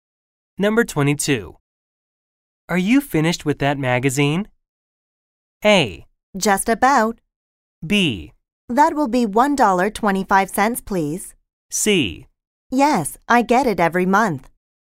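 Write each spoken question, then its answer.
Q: Are you finished with that magazine?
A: A: Just about.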